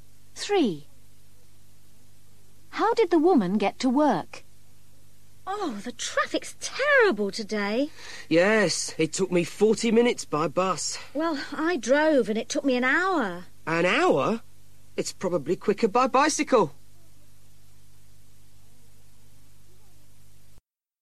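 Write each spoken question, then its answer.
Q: How did the woman get to work?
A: By bus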